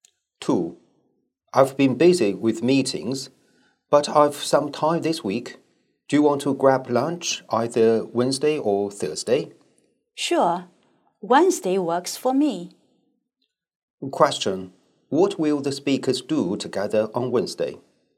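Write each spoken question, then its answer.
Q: What will the speakers do together on Wednesday?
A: Have lunch together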